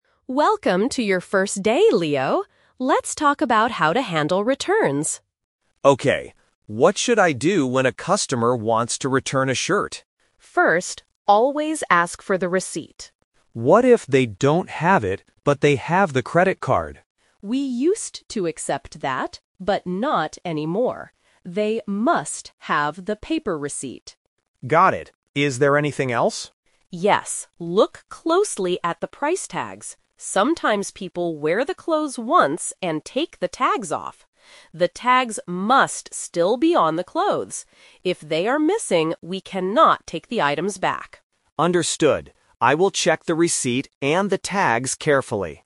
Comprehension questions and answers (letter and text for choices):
Listen to the conversation between a store manager and a new cashier. Read the questions and choose the correct answer (A, B, or C).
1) What must the customer have to return an item?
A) A credit card.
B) The paper receipt.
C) A membership card.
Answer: B) The paper receipt.

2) What is the rule about the price tags?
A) They must still be attached to the clothes.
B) The cashier must take them off.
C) They must be put inside a box.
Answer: A) They must still be attached to the clothes.

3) What will happen if the clothes do not have tags?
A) The store will not accept the return.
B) The cashier will ask the manager for help.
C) The customer will get their money back on a credit card.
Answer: A) The store will not accept the return.

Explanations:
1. The manager clearly states, "They must have the paper receipt." Why the trap is wrong: Option (A) is the "Twist" trap. The cashier asks about using a credit card, and the manager says they "used to accept that, but not anymore." Option (C) is never mentioned.
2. The manager says, "The tags must still be on the clothes." Why the trap is wrong: Option (B) is a trap. The manager mentions the phrase "take the tags off," but it refers to what customers sometimes do, not what the cashier should do.
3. The manager explicitly says, "If they are missing, we cannot take the items back." Why the trap is wrong: Option (C) uses the words "credit card," which were mentioned earlier in a different context, making it a distractor. Option (B) is a plausible action in real life but is not mentioned in the dialogue.

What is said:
Manager: Welcome to your first day, Leo. Let's talk about how to handle returns.
Cashier: Okay. What should I do when a customer wants to return a shirt?
Manager: First, always ask for the receipt.
Cashier: What if they don't have it, but they have the credit card?
Manager: We used to accept that, but not anymore. They must have the paper receipt.
Cashier: Got it. Is there anything else?
Manager: Yes. Look closely at the price tags. Sometimes people wear the clothes once and take the tags off. The tags must still be on the clothes. If they are missing, we cannot take the items back.